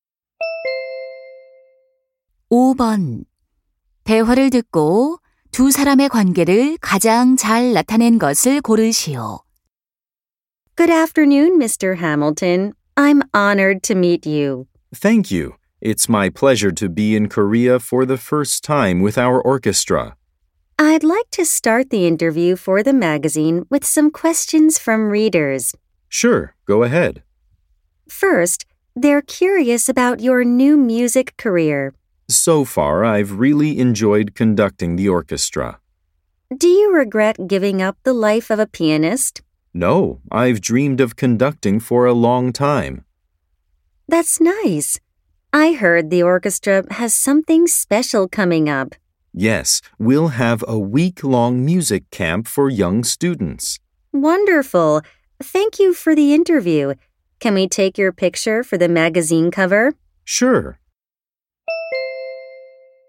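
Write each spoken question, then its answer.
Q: 대화를 듣고 두 사람의 관계를 가장 잘 나타낸 것을 고르시오.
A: 잡지 기자 - 지휘자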